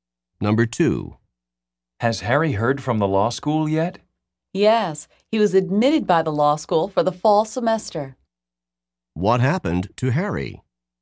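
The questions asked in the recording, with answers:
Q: What happened to Harry?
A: He was accepted to law school for the fall semester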